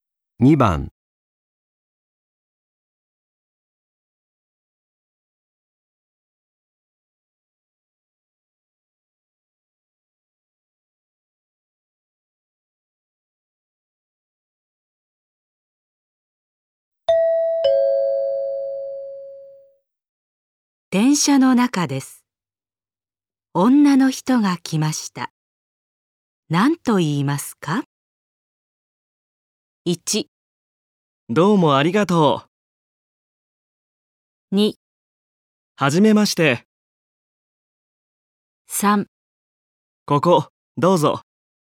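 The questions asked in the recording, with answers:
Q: 電車の中です。女の人が来ました。何と言いますか?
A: 3: ここ、どうぞ。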